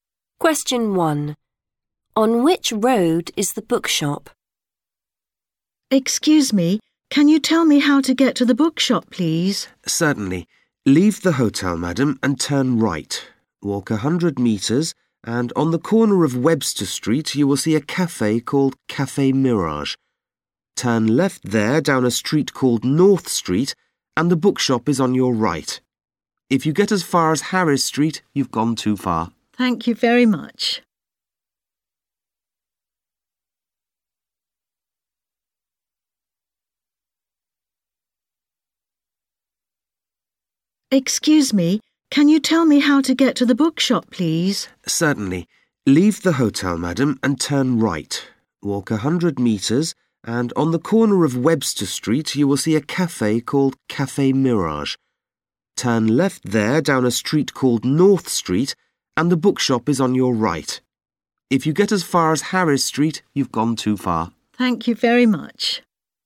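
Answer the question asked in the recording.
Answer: North Street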